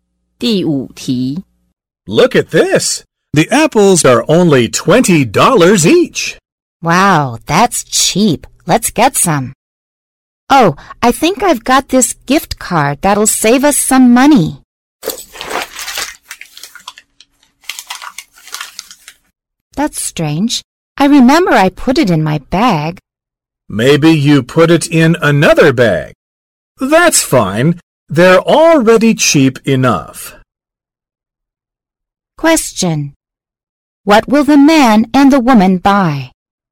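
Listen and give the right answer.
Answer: Apples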